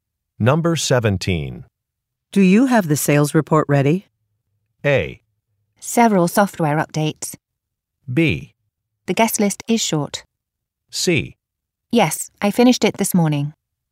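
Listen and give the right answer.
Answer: C: Yes, I finished it this morning.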